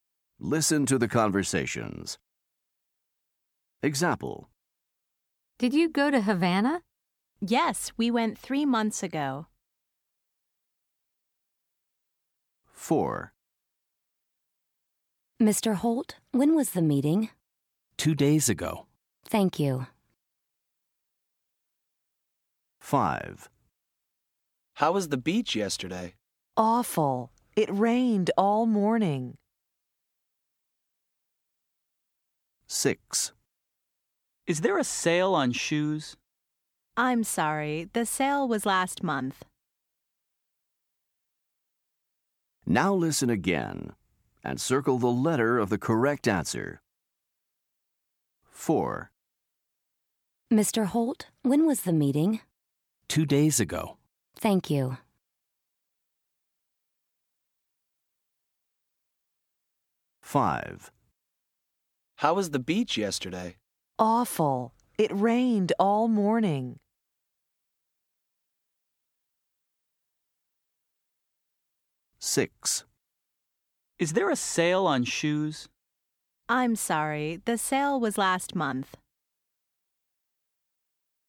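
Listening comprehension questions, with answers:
Listen to the conversations. Then listen again and select the letter of the correct answer.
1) If today is Friday, the meeting was on ............ .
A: Wednesday

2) Today is Sunday. The people went to the beach on ............ .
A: Saturday

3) It is June now. The sale was in .............. .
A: May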